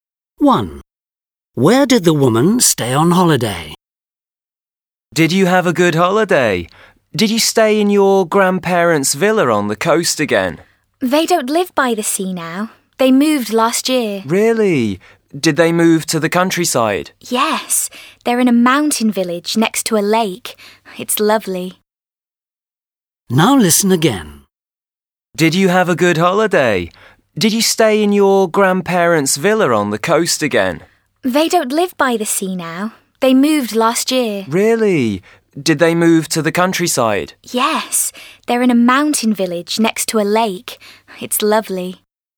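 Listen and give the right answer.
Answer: In her grandparents' house in a mountain village next to a lake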